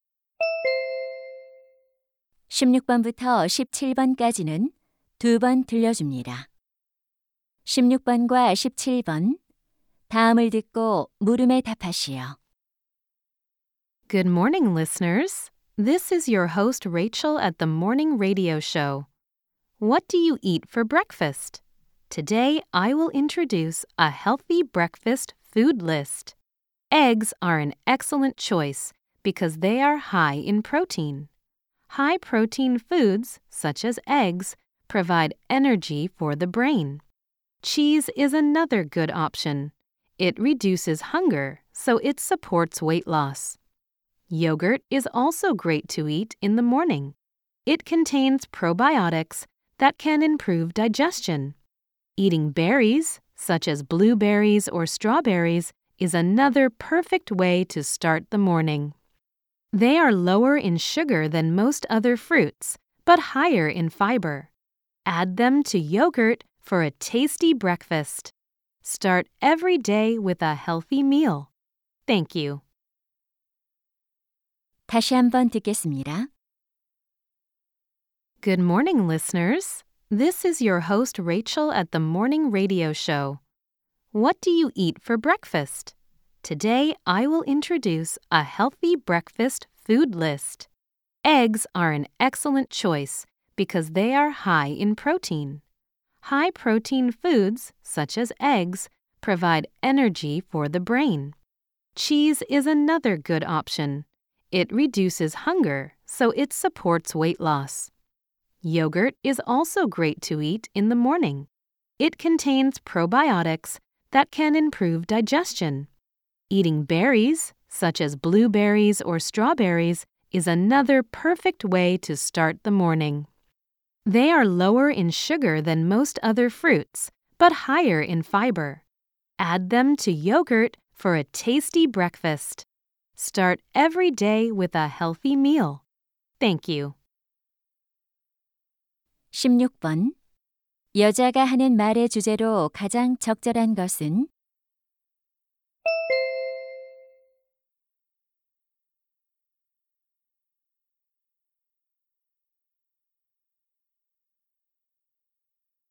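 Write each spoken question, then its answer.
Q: 여자가 하는 말의 주제로 가장 적절한 것은?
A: 건강한 아침 식사 음식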